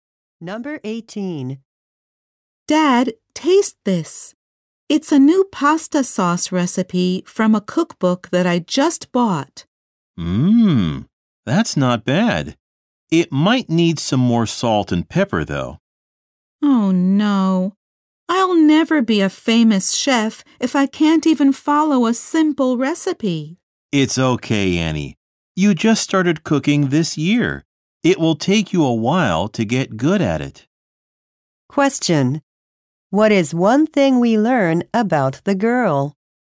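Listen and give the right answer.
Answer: She started cooking this year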